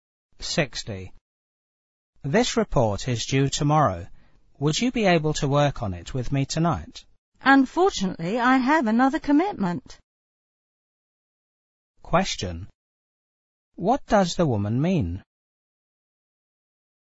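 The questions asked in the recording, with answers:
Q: What does the woman mean?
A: She can't work on the report tonight.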